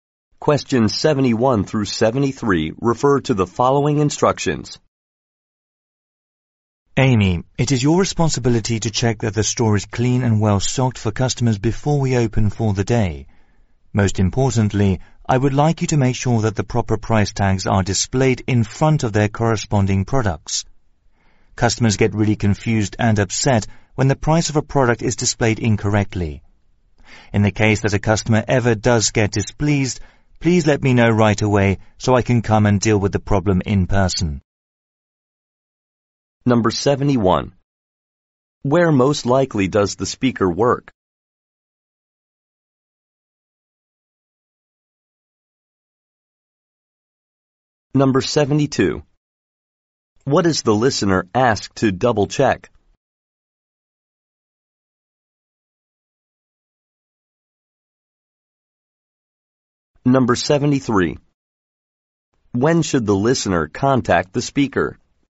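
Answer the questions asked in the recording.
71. At a store
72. That the price tags are correct
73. When a customer is displeased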